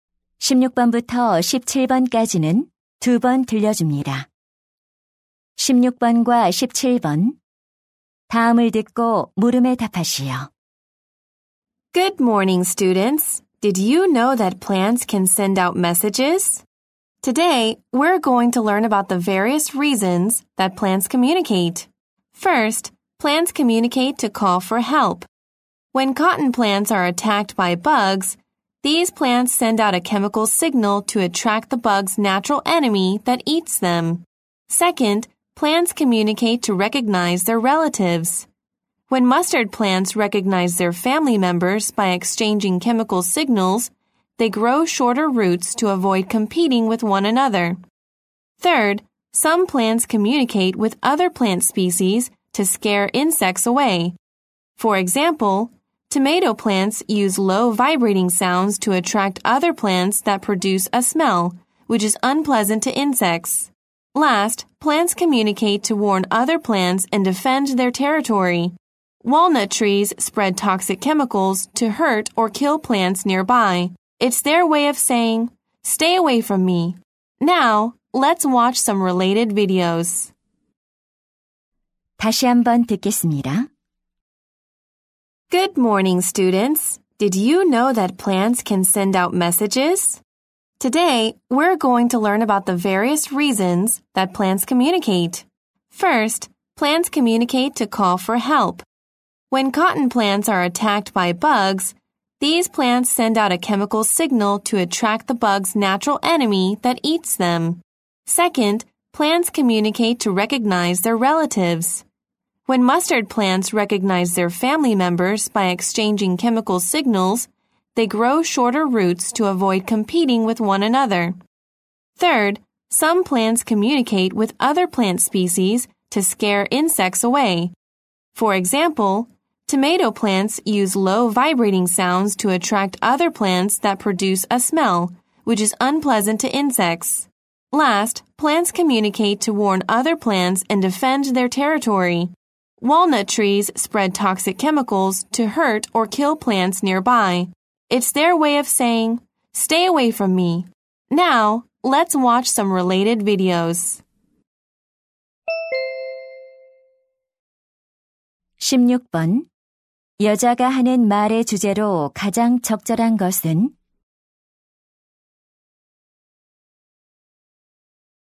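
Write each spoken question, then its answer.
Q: 여자가 하는 말의 주제로 가장 적절한 것은?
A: 식물이 의사소통하는 다양한 이유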